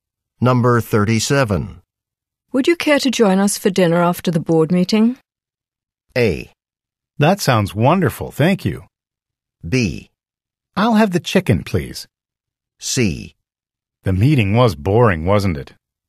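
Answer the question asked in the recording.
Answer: A: That sounds wonderful, thank you.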